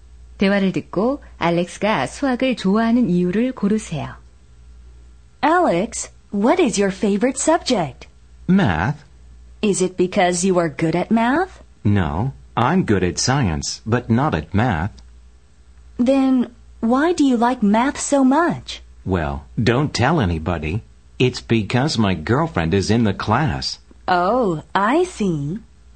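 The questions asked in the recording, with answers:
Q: 대화를 듣고 알렉스가 수학을 좋아하는 이유를 고르세요.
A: 여자친구가 그 수업에 있어서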